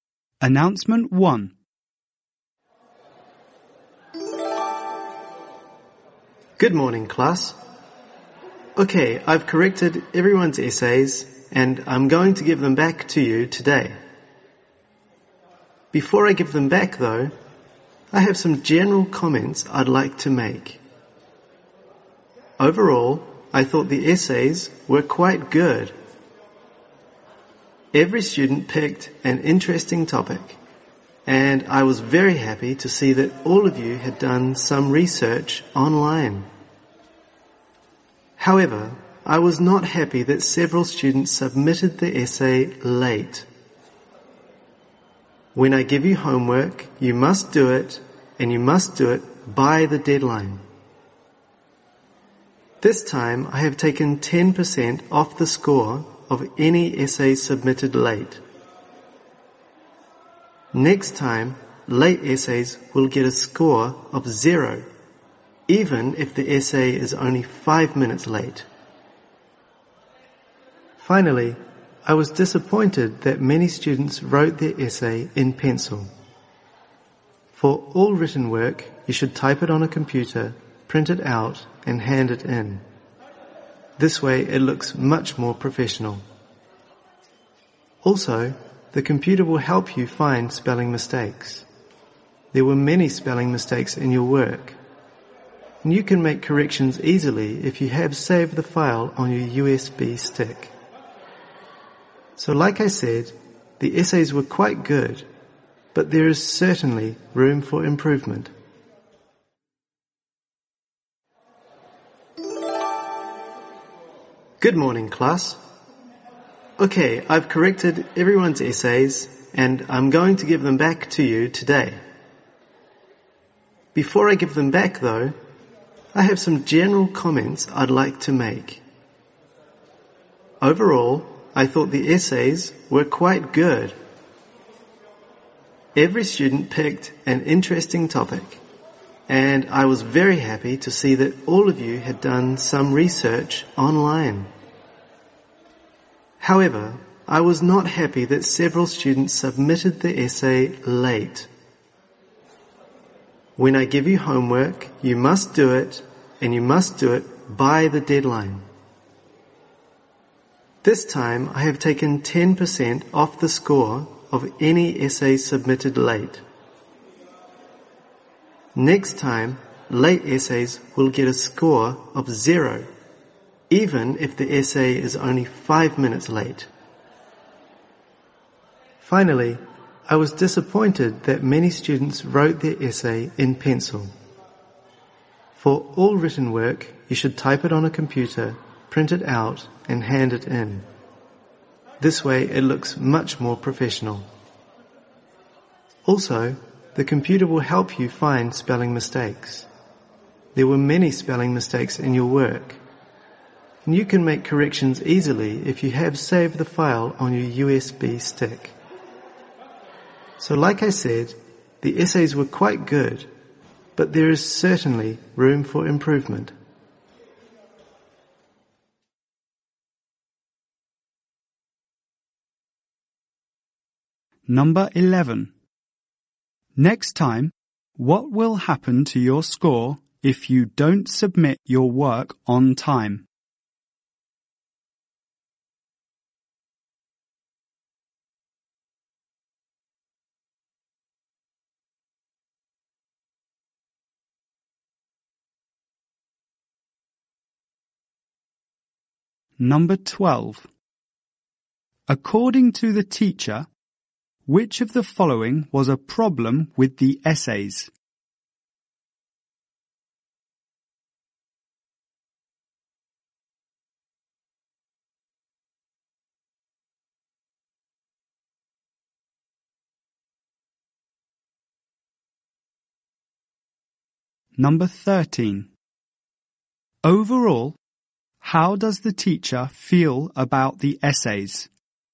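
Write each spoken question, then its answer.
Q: Next time, what will happen to your score if you don't submit your work on time?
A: It will be zero.

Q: Overall, how does the teacher feel about the essays?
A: They were quite good, but there is room for improvement.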